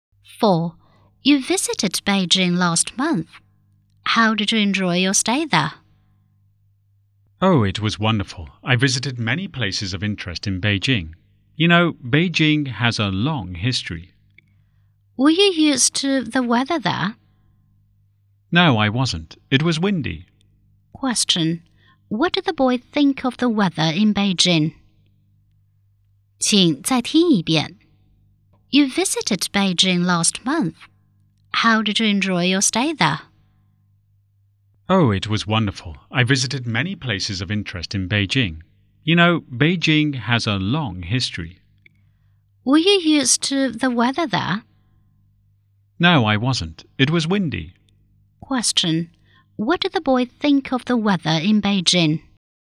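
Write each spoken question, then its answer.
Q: What did the boy think of the weather in Beijing?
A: It was windy; he wasn't used to it.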